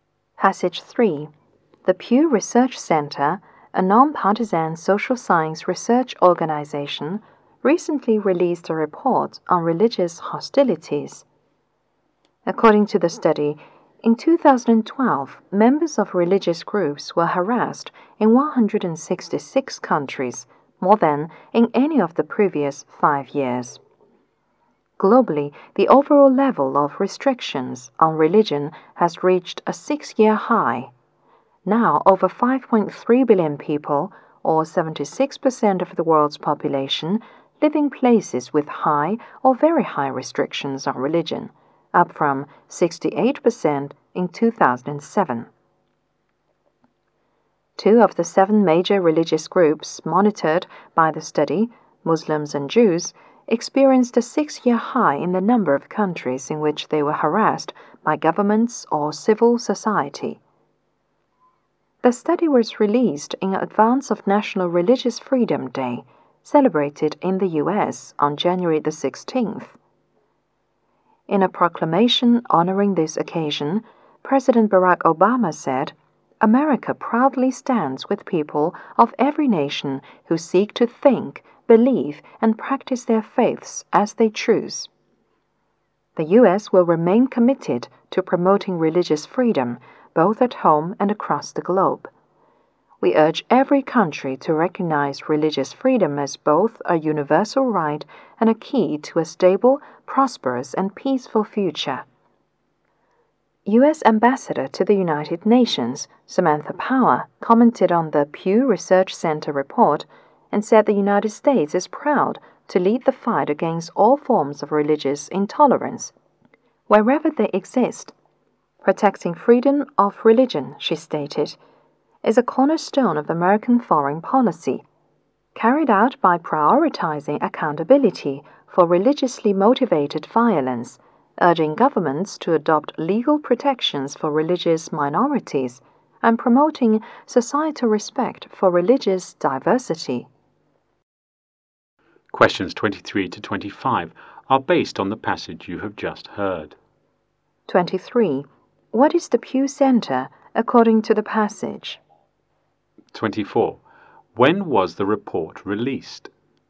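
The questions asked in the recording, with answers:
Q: What is the pew center according to the passage?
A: A nonpartisan social science research organization

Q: When was the report released?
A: Before National Religious Freedom Day (January 16)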